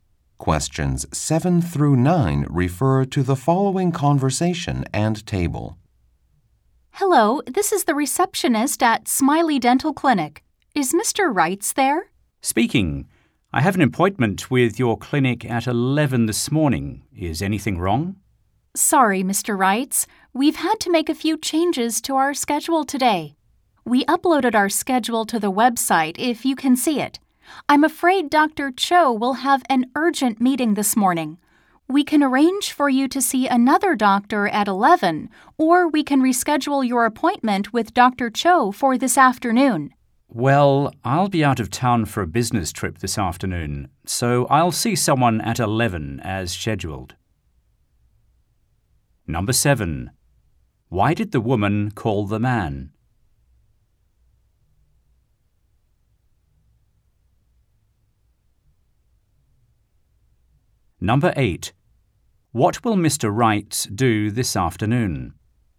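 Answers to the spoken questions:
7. To tell him his appointment with Dr. Cho has to change because of a schedule change
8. Go out of town on a business trip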